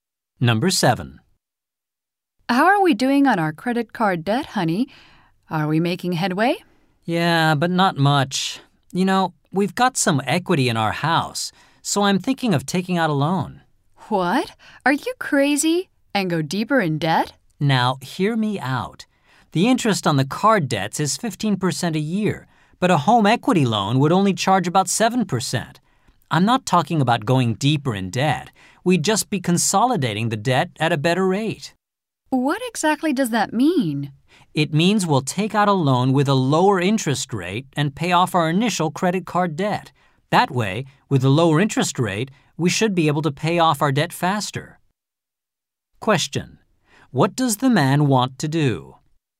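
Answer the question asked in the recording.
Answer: Take out a lower-interest home equity loan to pay off their credit card debt.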